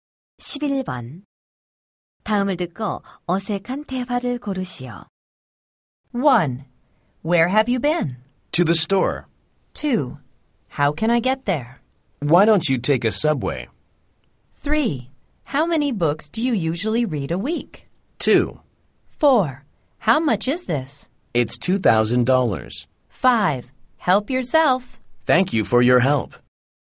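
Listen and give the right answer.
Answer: 5: Help yourself. / Thank you for your help.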